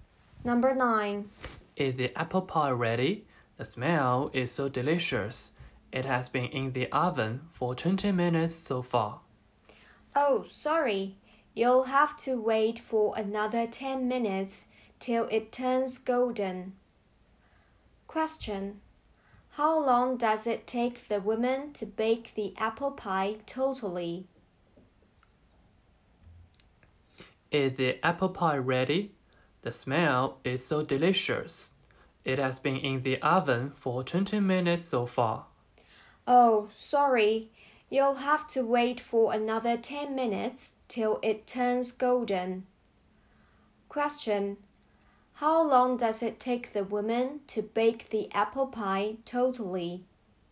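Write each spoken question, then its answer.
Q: How long does it take the woman to bake the apple pie totally?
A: 30 minutes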